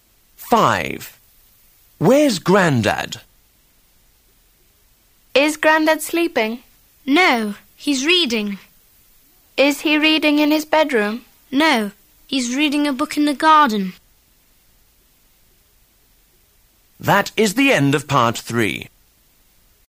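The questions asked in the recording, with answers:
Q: Where's Grandad?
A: In the garden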